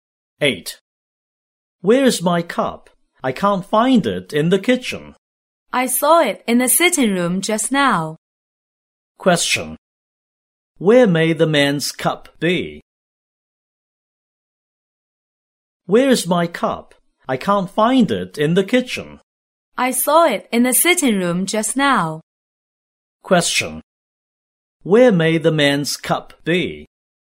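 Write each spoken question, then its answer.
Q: Where may the man's cup be?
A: In the sitting room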